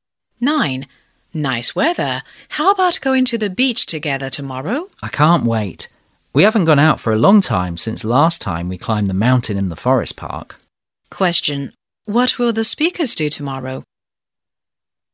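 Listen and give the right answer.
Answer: Go to the beach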